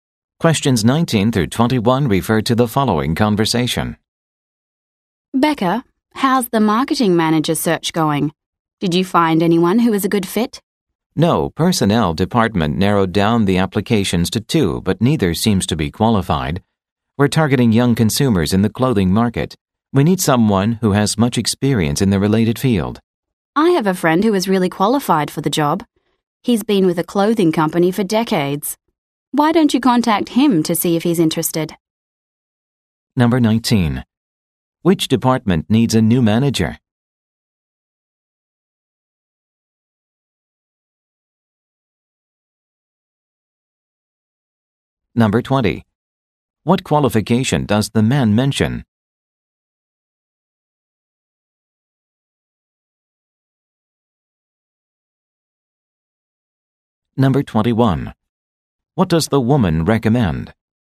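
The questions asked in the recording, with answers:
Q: Which department needs a new manager?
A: Marketing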